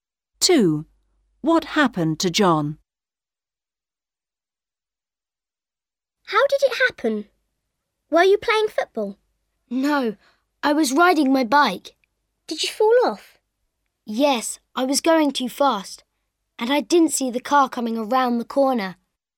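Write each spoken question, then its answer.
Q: What happened to John?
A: He fell off his bike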